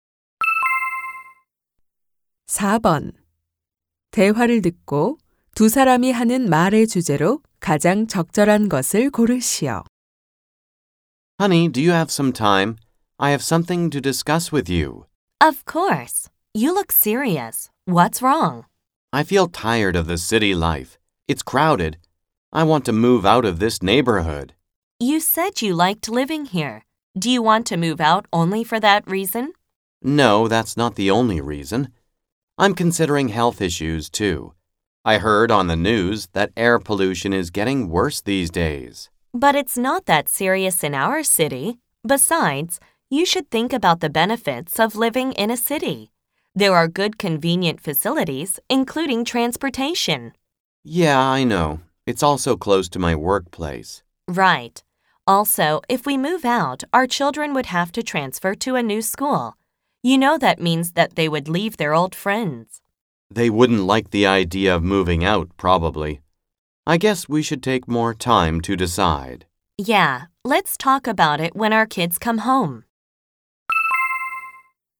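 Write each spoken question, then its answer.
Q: 대화를 듣고 두 사람이 하는 말의 주제로 가장 적절한 것을 고르시오.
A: 도시를 떠나 이사하는 문제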